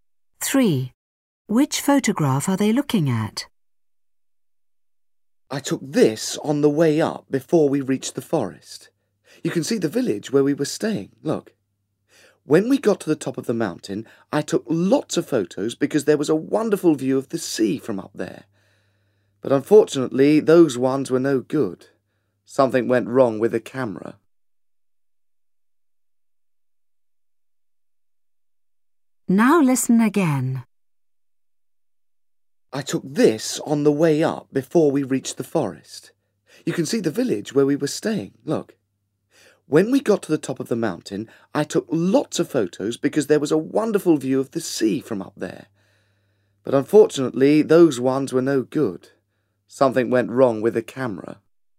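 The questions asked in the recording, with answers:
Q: Which photograph are they looking at?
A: The one of the village, taken on the way up before the forest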